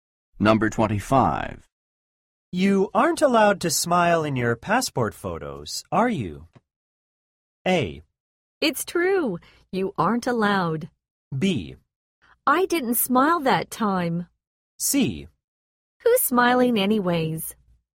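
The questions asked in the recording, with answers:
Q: You aren't allowed to smile in your passport photos, are you?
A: A: It's true. You aren't allowed.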